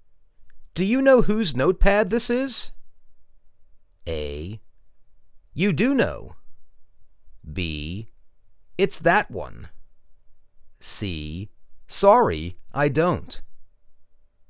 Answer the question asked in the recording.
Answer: Sorry, I don't.